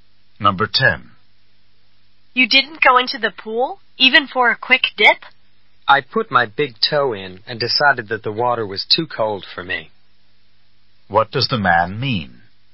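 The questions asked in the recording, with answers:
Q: What does the man mean?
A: He didn't go in because the water was too cold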